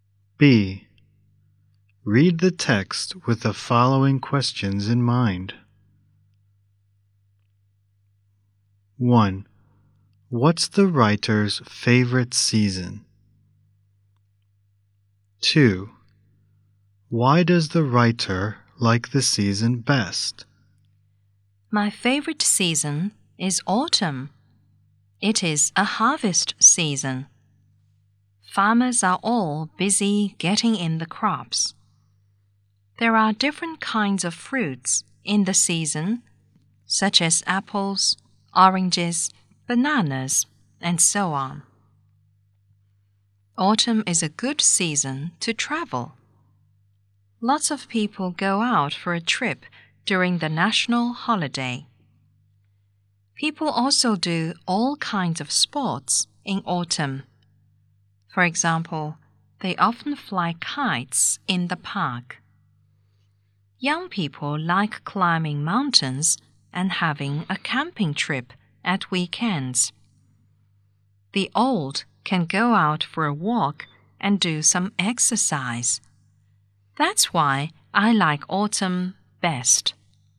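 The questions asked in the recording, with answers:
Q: What's the writer's favorite season?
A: Autumn

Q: Why does the writer like the season best?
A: It is a harvest season with many fruits, good for travel and for all kinds of sports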